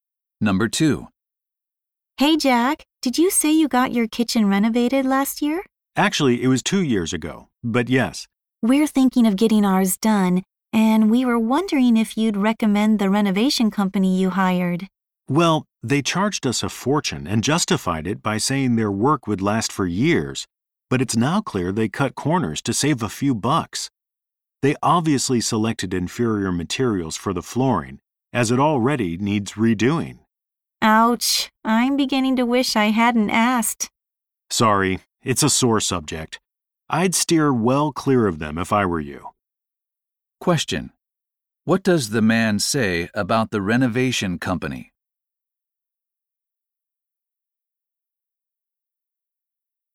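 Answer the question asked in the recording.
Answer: It used poor-quality materials to save money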